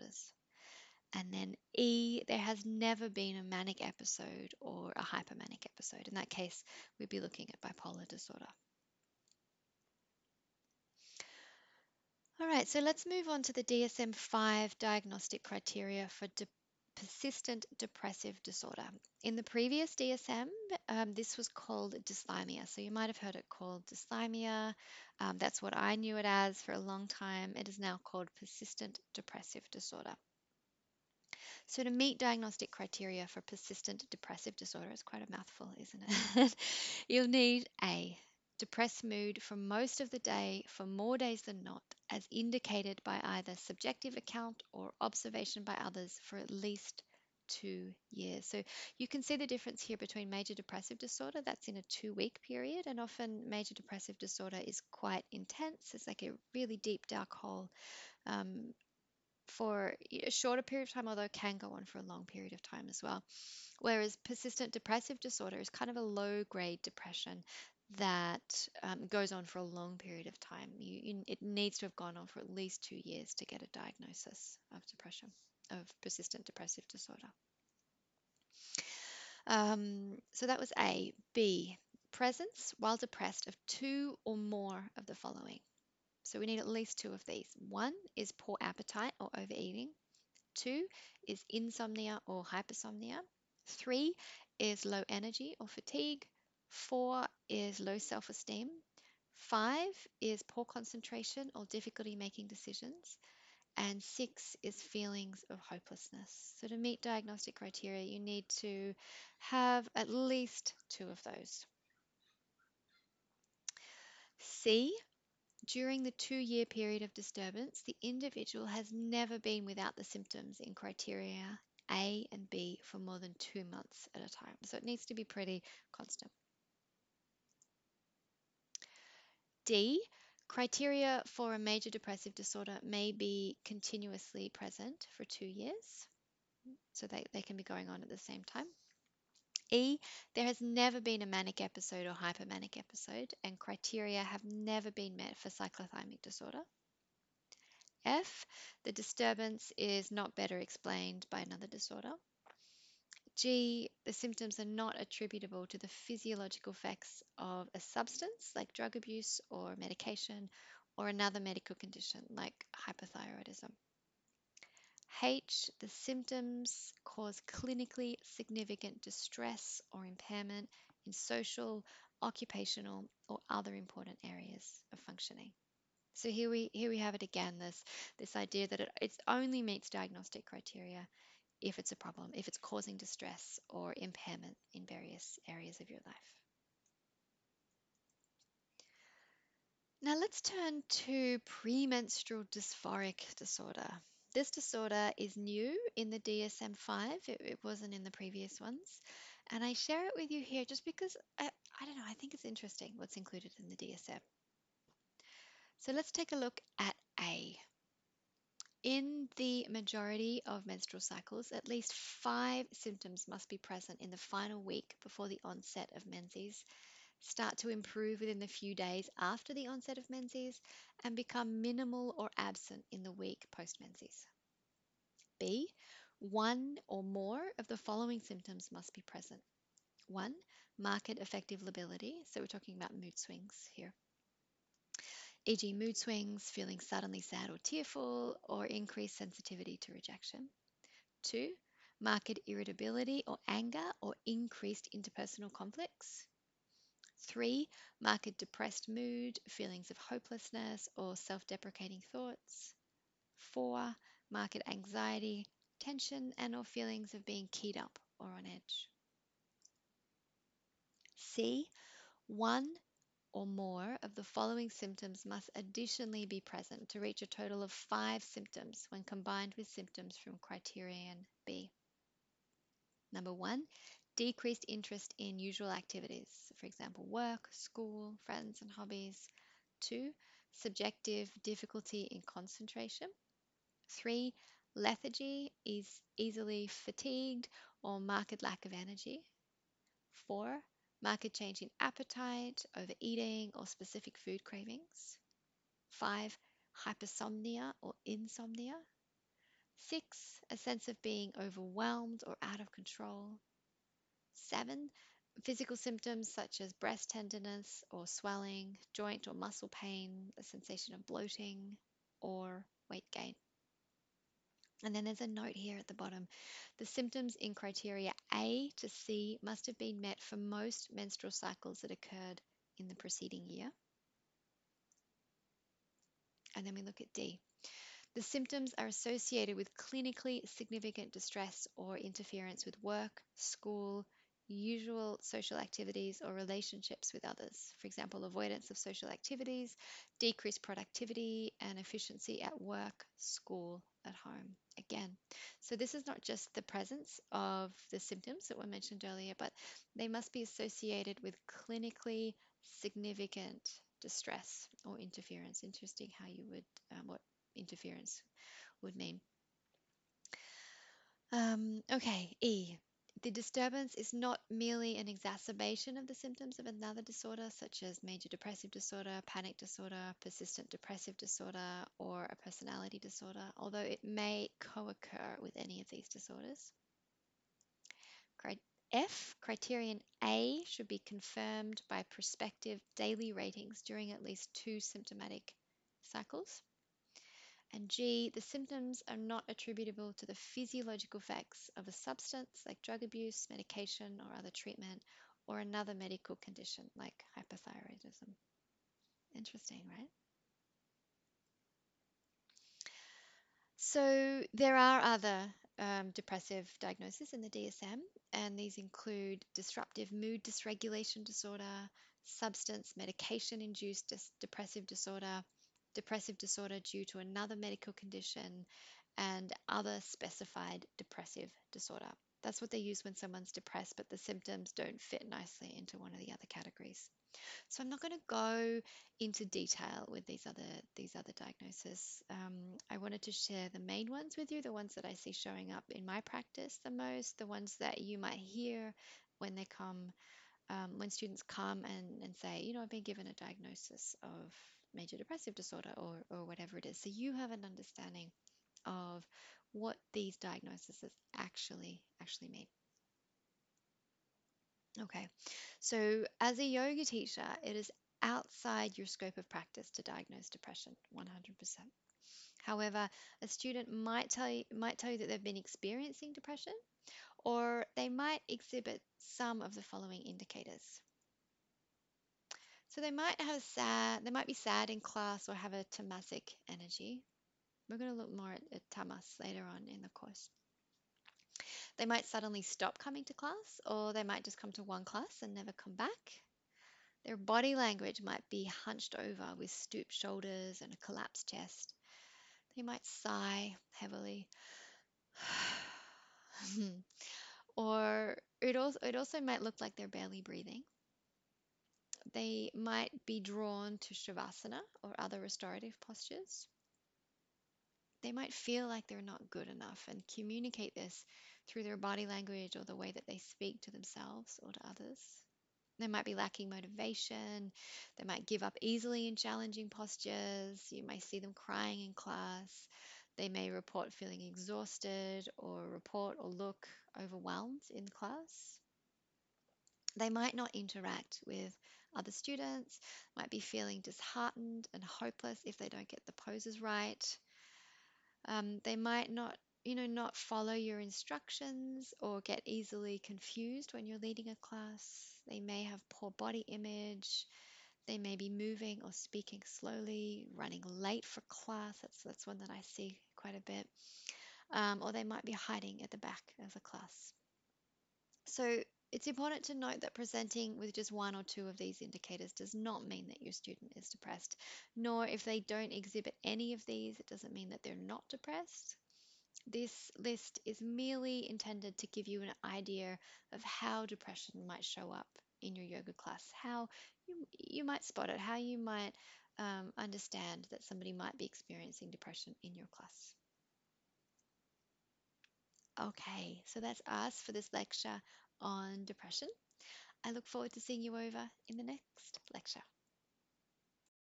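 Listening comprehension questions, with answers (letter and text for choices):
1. An individual has had a mild depressed mood for most of the day, for more days than not, for over 2 years. They are also experiencing poor appetite, difficulty making decisions and feelings of hopelessness. What might they be experiencing?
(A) Major Depressive Disorder.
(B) Persistent Depressive Disorder.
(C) Premenstrual Dysphoric Disorder.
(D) Schizophrenia.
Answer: (B) Persistent Depressive Disorder.

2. What indicators might a student exhibit if they're depressed?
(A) Body language is hunched over with stooped shoulders and a collapsed chest.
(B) Lacking motivation and giving up easily.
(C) Not interacting with other students.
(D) All of the above.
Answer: (D) All of the above.

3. If a student presents with two of the indicators of depression, as a Yoga Teacher you should:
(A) Immediately tell them your diagnosis of depression.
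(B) Note to yourself that they may have symptoms of depression and consider how you could best support them, but realise it's not your role to diagnose depression.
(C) Call their emergency contact and let them know your diagnosis of depression.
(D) All of the above.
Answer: (B) Note to yourself that they may have symptoms of depression and consider how you could best support them, but realise it's not your role to diagnose depression.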